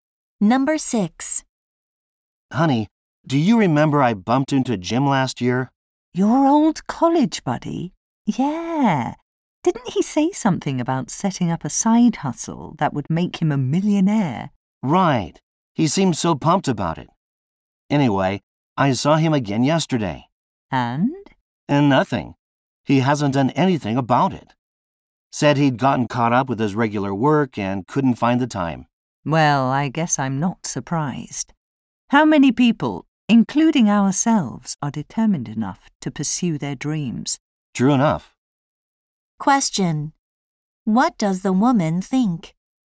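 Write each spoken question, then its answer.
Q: What does the woman think?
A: Few people are determined enough to pursue their dreams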